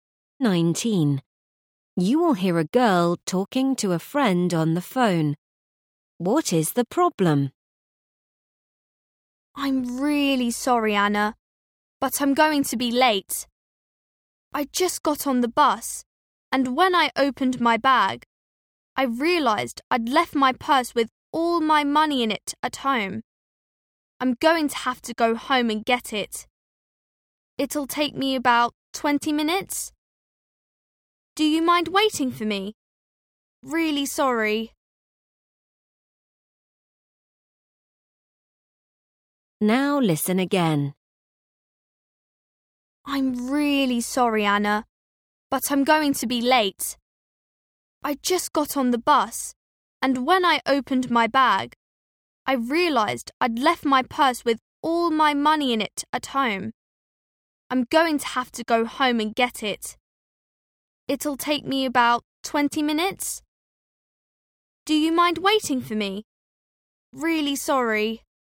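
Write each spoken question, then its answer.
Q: What is the problem?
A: She left her purse with her money at home.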